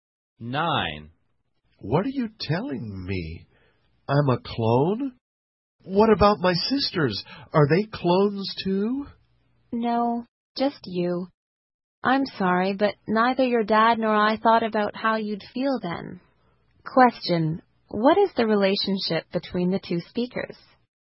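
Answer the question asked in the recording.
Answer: Parent and child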